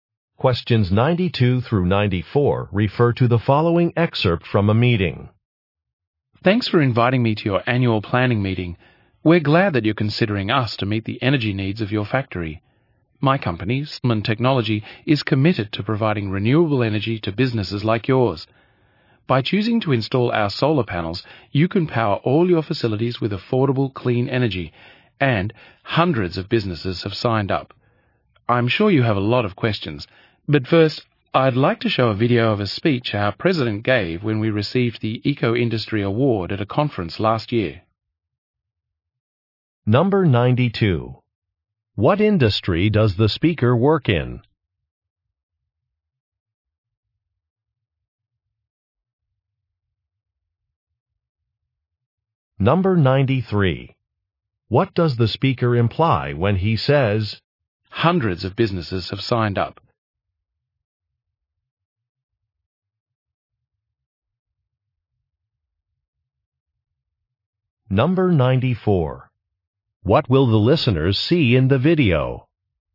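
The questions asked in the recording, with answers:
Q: What industry does the speaker work in?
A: Renewable energy

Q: What will the listeners see in the video?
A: A speech by the company president at an award ceremony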